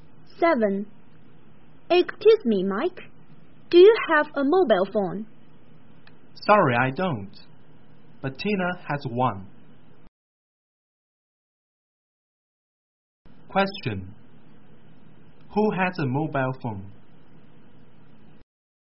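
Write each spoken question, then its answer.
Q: Who has a mobile phone?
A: Tina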